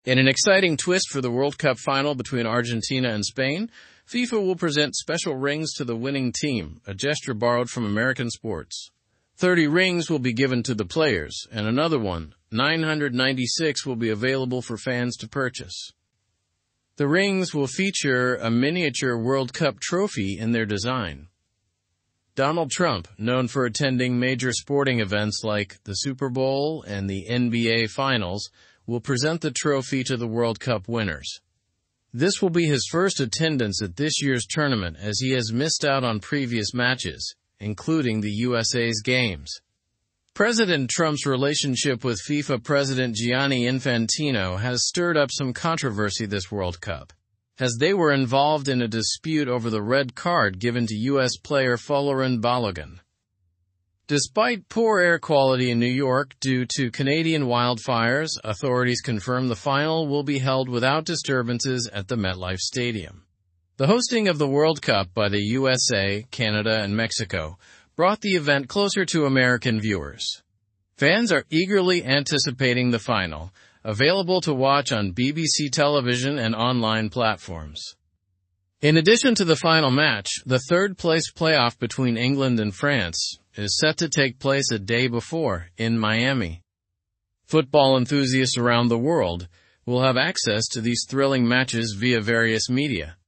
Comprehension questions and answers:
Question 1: What is the special gesture FIFA is making for the winning team?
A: FIFA will present special rings to the winning team.

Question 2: Who is presenting the World Cup trophy to the winners?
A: Donald Trump is presenting the World Cup trophy.

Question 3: What controversy is mentioned in the article?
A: The controversy involves a dispute between Trump and FIFA President Infantino.

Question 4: Where is the World Cup final taking place?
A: The final is taking place at MetLife Stadium in New York.

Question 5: What has affected the air quality in New York?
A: Canadian wildfires have affected the air quality in New York.

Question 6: Which teams are playing in the third-place play-off?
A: England and France are playing in the third-place play-off.

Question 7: How can fans watch the World Cup matches?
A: Fans can watch the matches on BBC television and online platforms.

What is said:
In an exciting twist for the World Cup final between Argentina and Spain, FIFA will present special rings to the winning team, a gesture borrowed from American sports. Thirty rings will be given to the players, and another 1,996 will be available for fans to purchase. The rings will feature a miniature World Cup trophy in their design.
Donald Trump, known for attending major sporting events like the Super Bowl and the NBA finals, will present the trophy to the World Cup winners. This will be his first attendance at this year's tournament as he has missed out on previous matches, including the USA's games. President Trump's relationship with FIFA President Gianni Infantino has stirred up some controversy this World Cup, as they were involved in a dispute over the red card given to U.S. player Folarin Balogun.
Despite poor air quality in New York due to Canadian wildfires, authorities confirm the final will be held without disturbances at the MetLife Stadium. The hosting of the World Cup by the USA, Canada, and Mexico brought the event closer to American viewers. Fans are eagerly anticipating the final, available to watch on BBC television and online platforms.
In addition to the final match, the third-place play-off between England and France is set to take place a day before, in Miami. Football enthusiasts around the world will have access to these thrilling matches via various media.

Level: Level 3